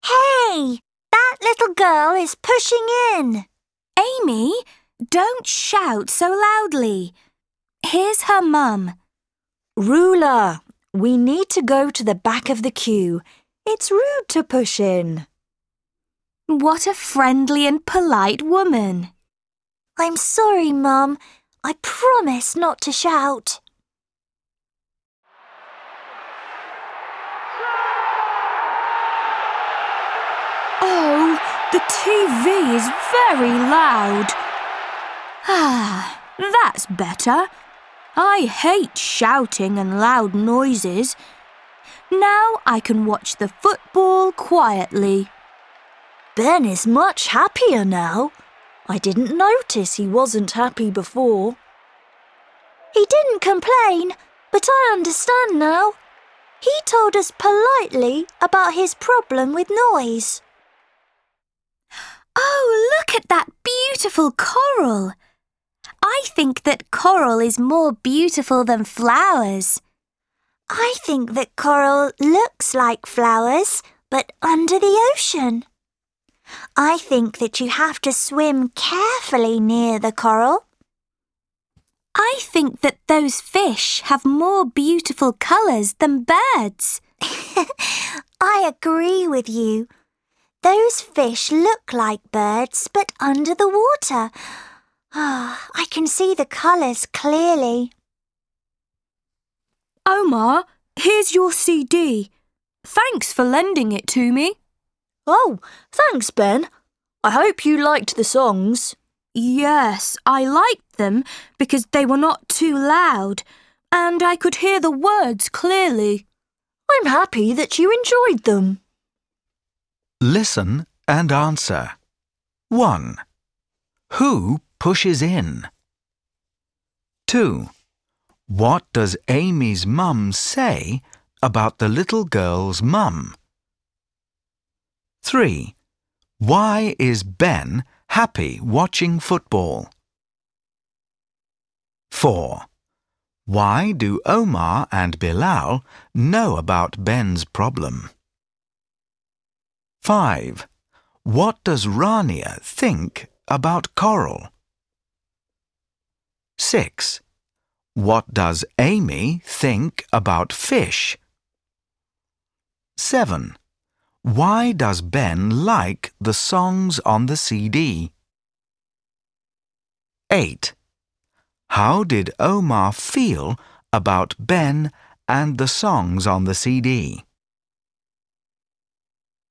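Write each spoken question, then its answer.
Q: Who pushes in?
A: A little girl

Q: What does Amy's mum say about the little girl's mum?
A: She is a friendly and polite woman

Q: Why is Ben happy watching football?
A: The TV is not loud now, so he can watch quietly

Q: Why do Omar and Bilal know about Ben's problem?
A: Ben told them politely about his problem with noise

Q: Why does Ben like the songs on the CD?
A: They were not too loud and he could hear the words clearly

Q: How did Omar feel about Ben and the songs on the CD?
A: Happy that Ben enjoyed them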